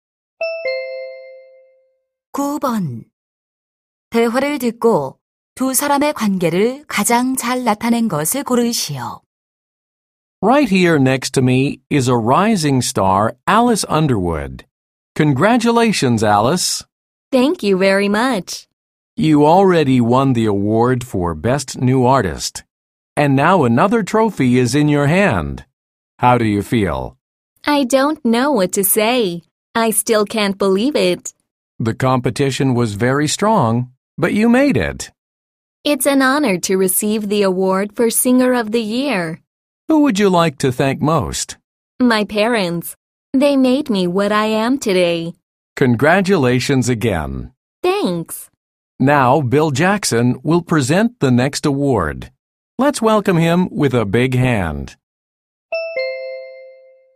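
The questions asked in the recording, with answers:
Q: 대화를 듣고 두 사람의 관계를 가장 잘 나타낸 것을 고르시오.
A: 시상식 진행자 - 가수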